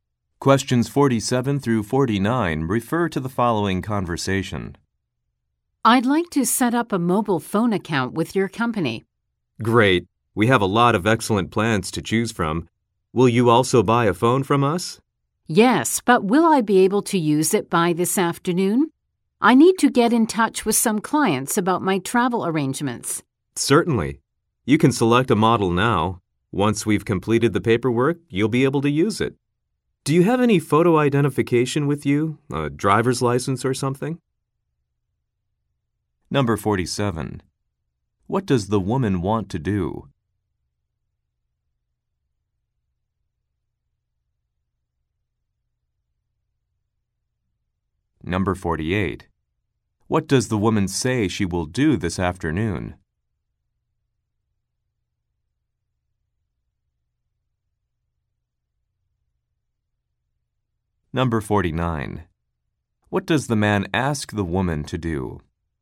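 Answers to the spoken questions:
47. Set up a mobile phone account
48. Contact clients about her travel arrangements
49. Show photo identification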